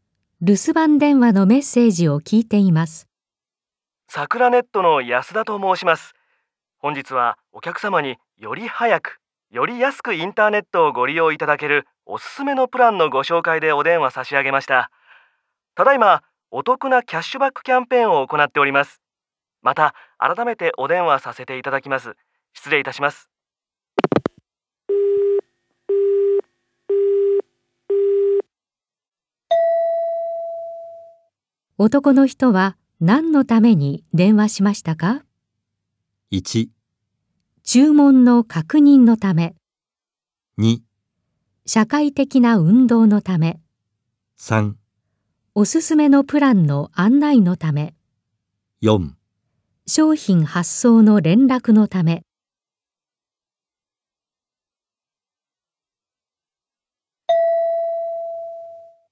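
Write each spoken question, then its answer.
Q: 男の人は何のために電話しましたか?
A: 3: おすすめのプランの案内のため。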